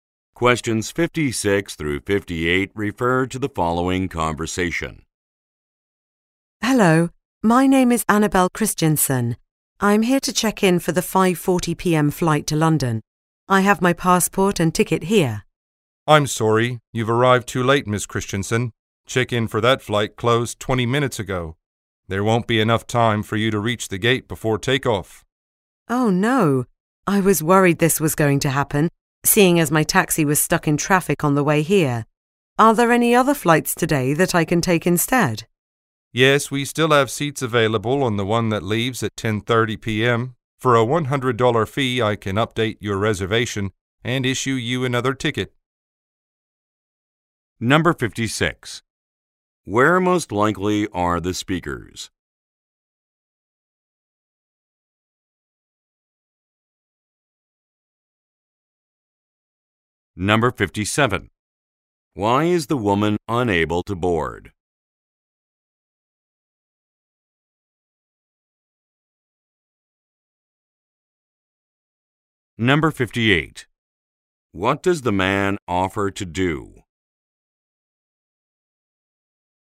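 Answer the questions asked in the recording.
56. At an airport
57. She arrived too late; check-in closed
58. Change her reservation to the 10:30 p.m. flight for a fee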